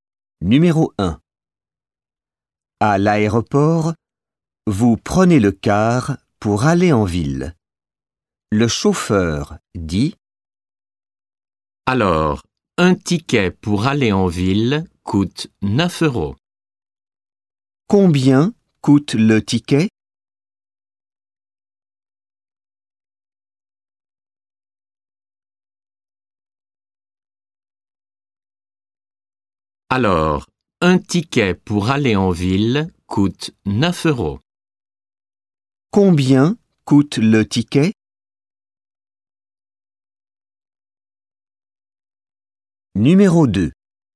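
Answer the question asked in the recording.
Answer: 9 euros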